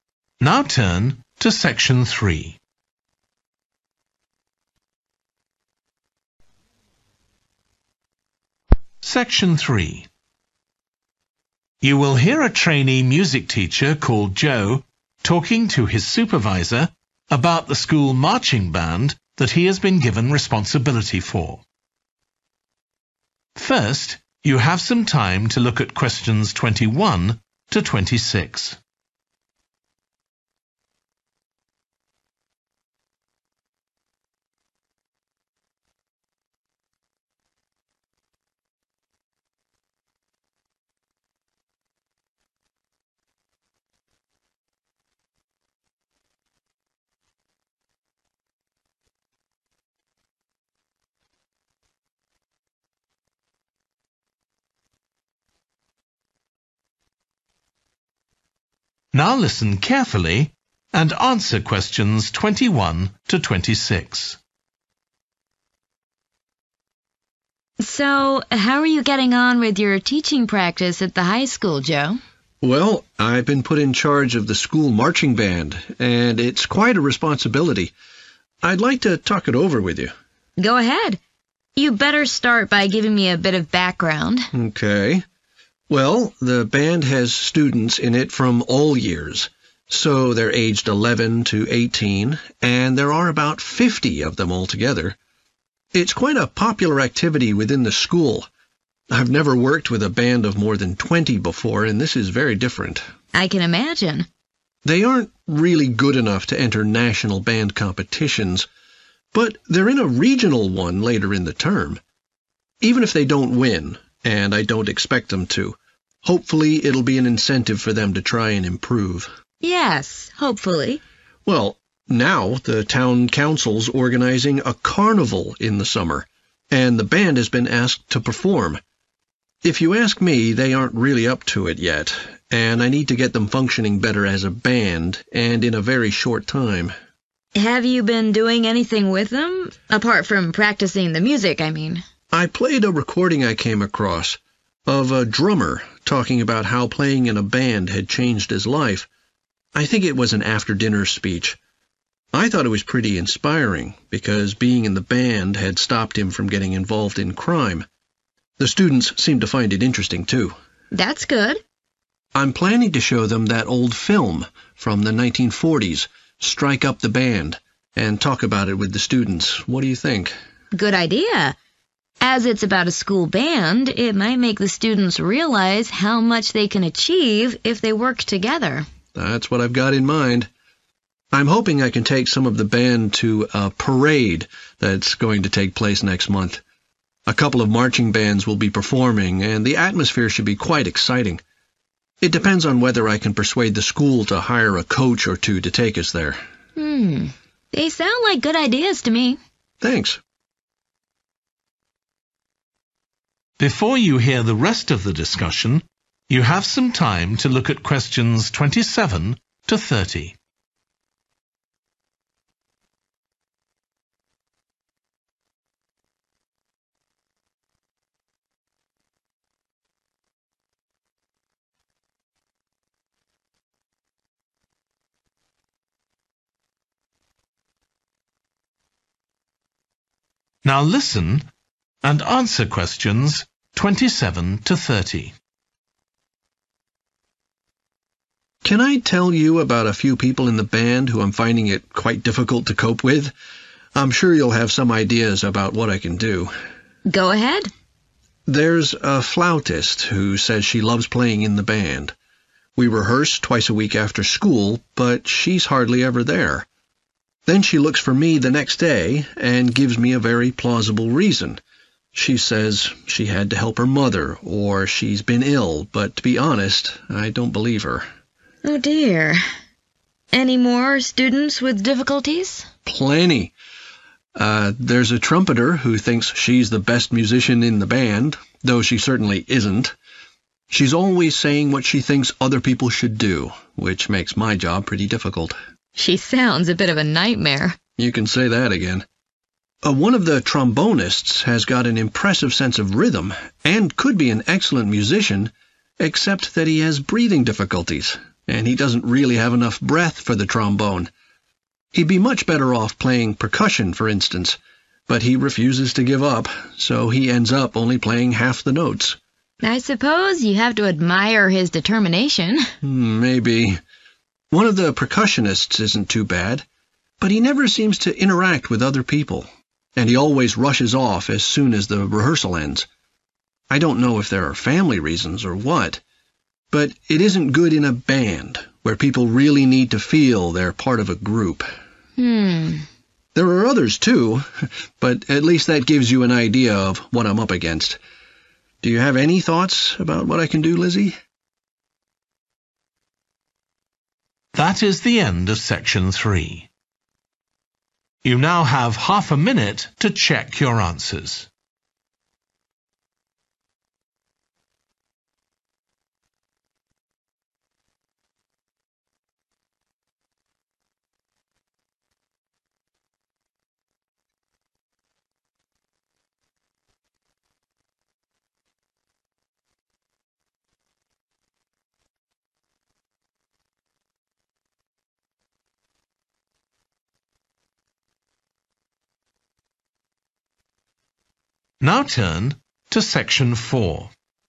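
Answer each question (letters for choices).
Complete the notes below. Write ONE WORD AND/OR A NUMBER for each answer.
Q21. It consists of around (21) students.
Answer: 50

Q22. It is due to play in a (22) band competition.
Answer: regional

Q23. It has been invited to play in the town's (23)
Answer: carnival

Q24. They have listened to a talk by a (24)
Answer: drummer

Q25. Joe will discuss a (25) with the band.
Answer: film

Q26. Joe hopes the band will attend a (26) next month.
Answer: parade

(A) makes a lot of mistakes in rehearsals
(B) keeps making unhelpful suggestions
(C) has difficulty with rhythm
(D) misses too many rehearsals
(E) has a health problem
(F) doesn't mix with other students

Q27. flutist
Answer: D

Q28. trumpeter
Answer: B

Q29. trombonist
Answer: E

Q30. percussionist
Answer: F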